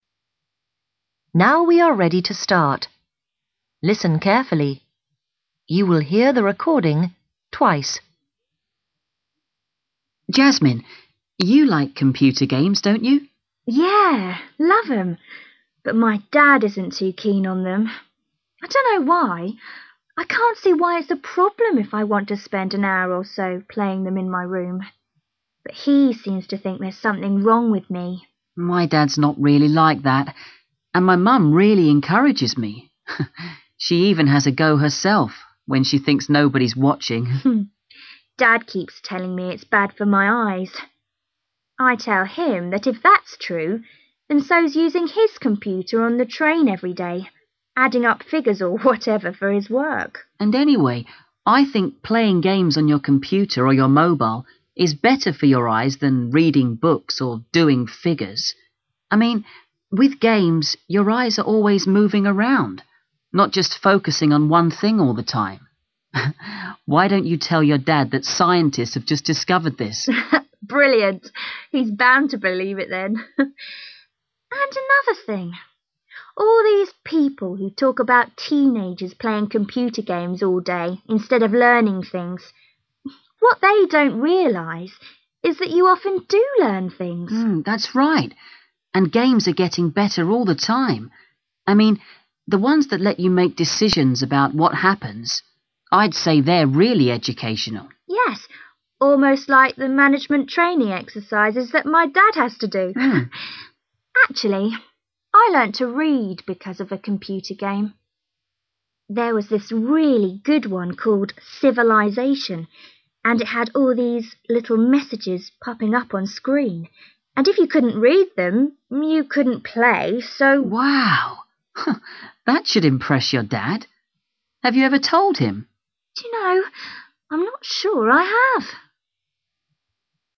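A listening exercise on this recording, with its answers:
Decide if each sentence is correct or incorrect. If it is correct, mark A. If it is not correct, mark В.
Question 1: Jasmine understands why her father dislikes computer games.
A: incorrect

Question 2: Malachi's parents have a better opinion of computer games than Jasmine's father has.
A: correct

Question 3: Malachi and Jasmine both believe that playing computer games is bad for your eyes.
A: incorrect

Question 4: Malachi suggests a way for Jasmine to change her father's opinion.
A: correct

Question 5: Jasmine thinks that computer games should be used for management training courses.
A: incorrect

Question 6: Jasmine had a computer game which taught her to read.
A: correct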